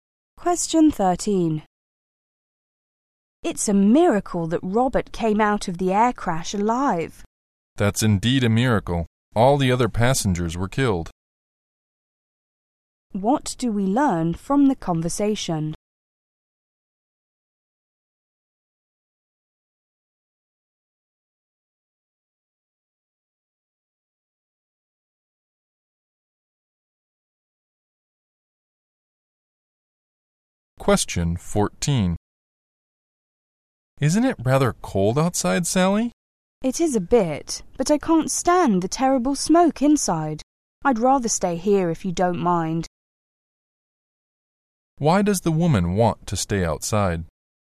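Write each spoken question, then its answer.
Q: What do we learn from the conversation?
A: Robert was the only survivor of the air crash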